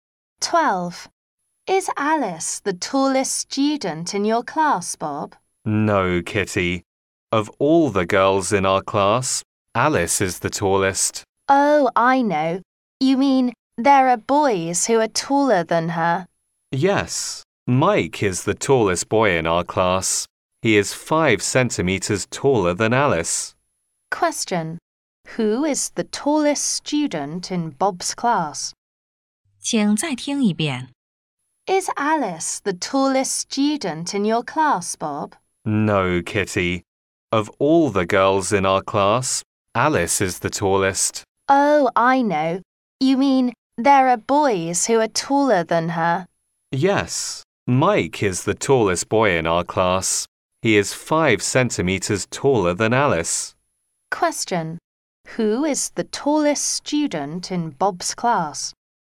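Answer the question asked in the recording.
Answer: Mike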